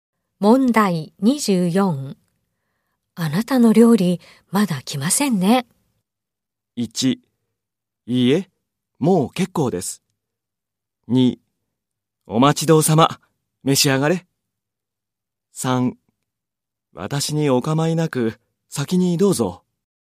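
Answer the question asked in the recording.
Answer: 3: 私にお構いなく、先にどうぞ。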